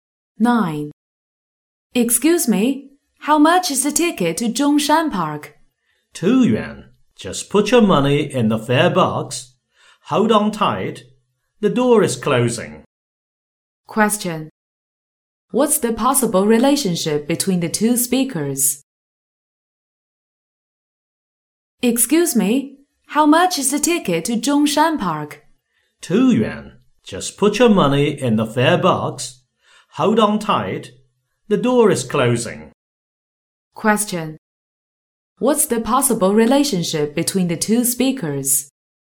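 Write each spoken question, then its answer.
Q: What's the possible relationship between the two speakers?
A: Passenger and bus driver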